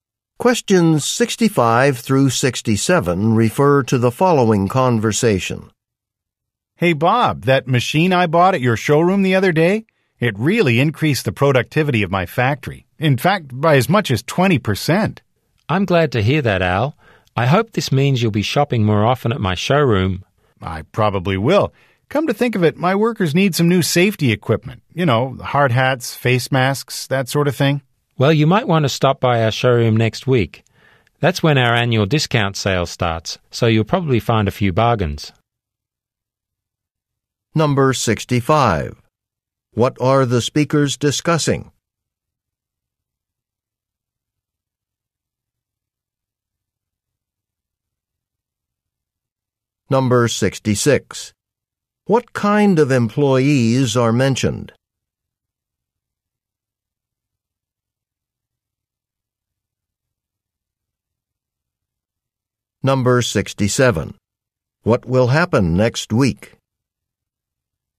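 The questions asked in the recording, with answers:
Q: What kind of employees are mentioned?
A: Factory workers

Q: What will happen next week?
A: The annual discount sale starts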